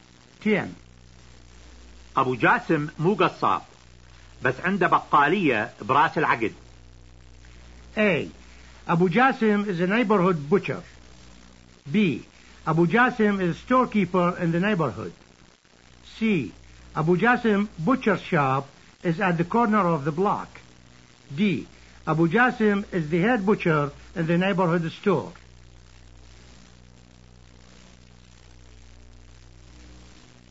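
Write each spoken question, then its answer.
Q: أبو جاسم مو قصاب، بس عنده بقالية براس العقد.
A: B: أبو جاسم is a storekeeper in the neighborhood.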